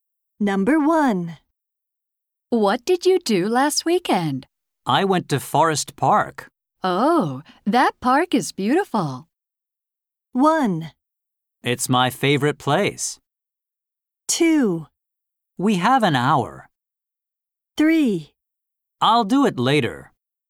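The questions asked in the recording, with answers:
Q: Oh, that park is beautiful.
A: 1: It's my favorite place.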